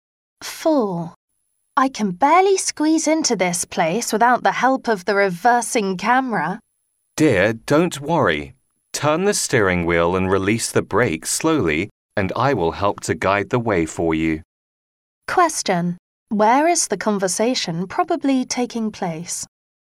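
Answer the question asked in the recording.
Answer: In a car park, while parking a car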